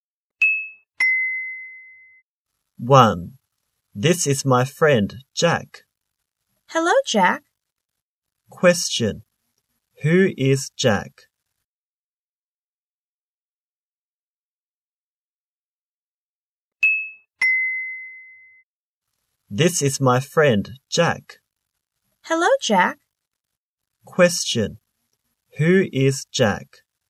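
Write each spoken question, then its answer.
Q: Who is Jack?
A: The speaker's friend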